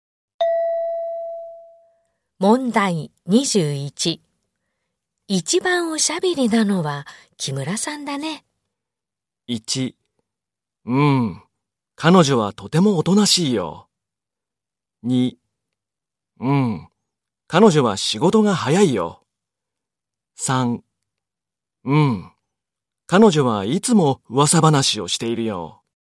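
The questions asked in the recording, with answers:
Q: 一番おしゃべりなのは木村さんだね。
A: 3: 彼女はいつも噂話をしているよ。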